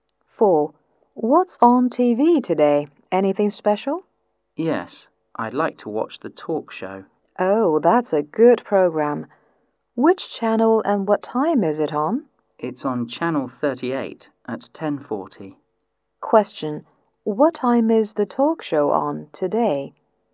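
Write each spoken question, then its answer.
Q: What time is the talk show on today?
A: At 10:40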